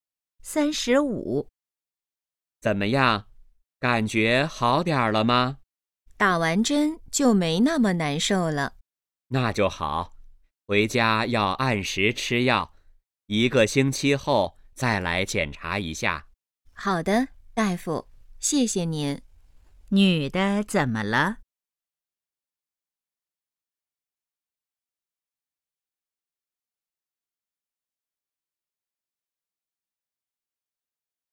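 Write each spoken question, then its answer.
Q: 女的怎么了?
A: 生病了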